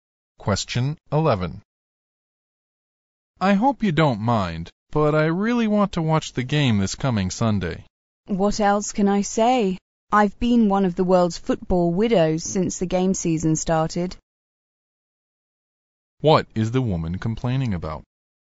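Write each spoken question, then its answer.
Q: What is the woman complaining about?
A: The man spends so much time watching football games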